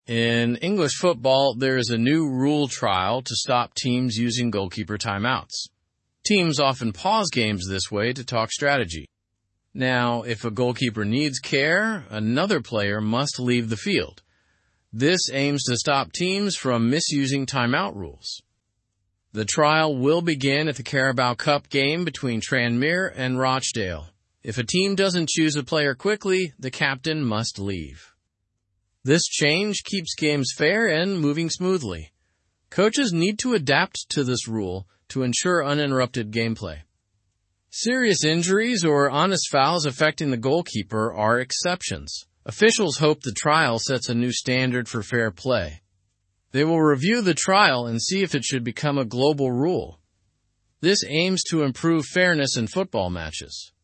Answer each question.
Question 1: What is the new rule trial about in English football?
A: It is to stop teams from using goalkeeper timeouts unfairly.

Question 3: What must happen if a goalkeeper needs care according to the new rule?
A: An outfield player must temporarily leave the field.

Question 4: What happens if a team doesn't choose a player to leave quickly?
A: The captain is required to leave the field.

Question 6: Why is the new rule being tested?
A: To maintain fairness and smoothness in football matches.

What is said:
In English football, there is a new rule trial to stop teams using goalkeeper timeouts. Teams often pause games this way to talk strategy. Now, if a goalkeeper needs care, another player must leave the field. This aims to stop teams from misusing timeout rules.
The trial will begin at the Carabao Cup game between Tranmere and Rochdale. If a team doesn't choose a player quickly, the captain must leave. This change keeps games fair and moving smoothly. Coaches need to adapt to this rule to ensure uninterrupted gameplay.
Serious injuries or honest fouls affecting the goalkeeper are exceptions. Officials hope the trial sets a new standard for fair play. They will review the trial and see if it should become a global rule. This aims to improve fairness in football matches.

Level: Level 2